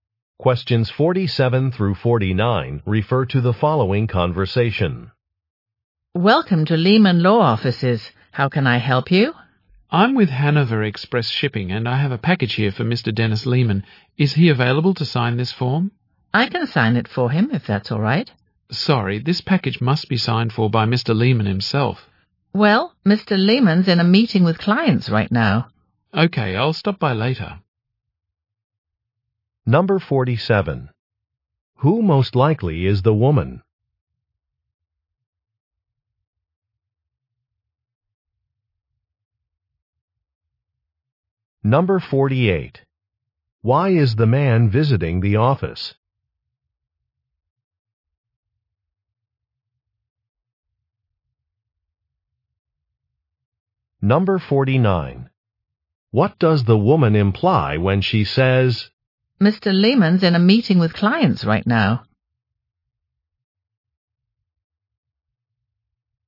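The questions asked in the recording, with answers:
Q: Who most likely is the woman?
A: A receptionist at a law office

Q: Why is the man visiting the office?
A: To deliver a package

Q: What does the woman imply when she says,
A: Mr. Lehman can't sign for the package right now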